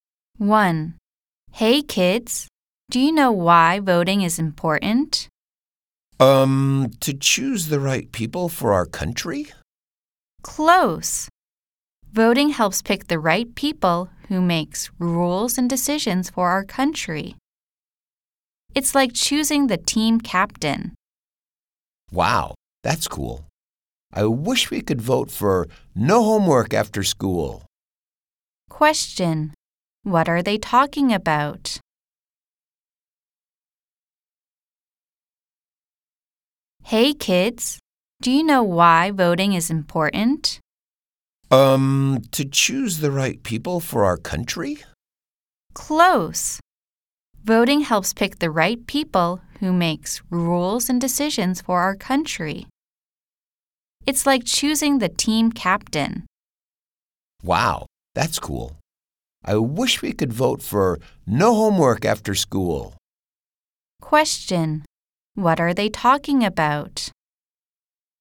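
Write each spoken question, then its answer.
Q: Question. What are they talking about?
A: Why voting is important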